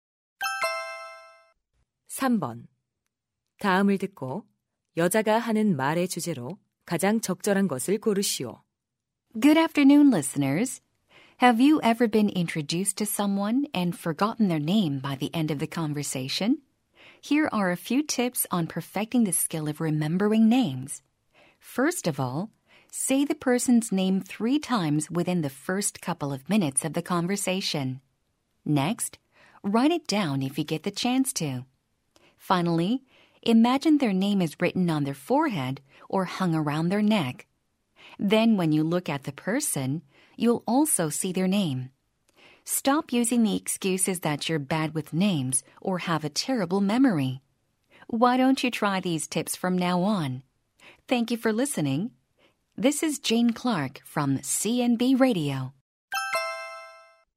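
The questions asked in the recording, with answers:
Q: 다음을 듣고 여자가 하는 말의 주제로 가장 적절한 것을 고르시오.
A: 사람 이름을 잘 기억하는 방법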